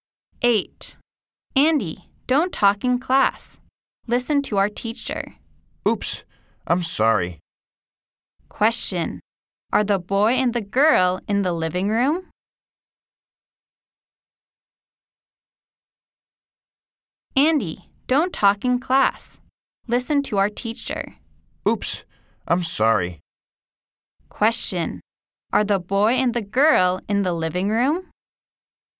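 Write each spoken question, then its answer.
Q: Are the boy and the girl in the living room?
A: No, they are in the classroom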